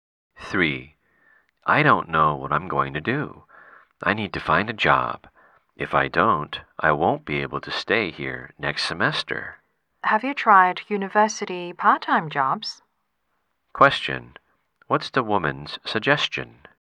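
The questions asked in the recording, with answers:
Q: What's the woman's suggestion?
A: Try university part-time jobs.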